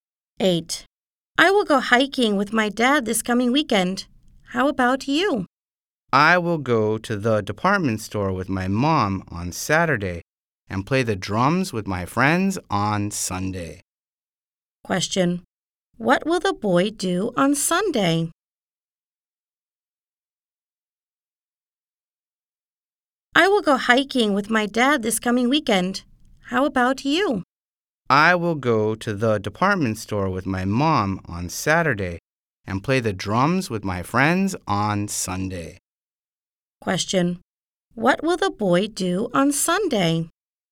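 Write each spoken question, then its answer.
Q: What will the boy do on Sunday?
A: Play the drums with his friends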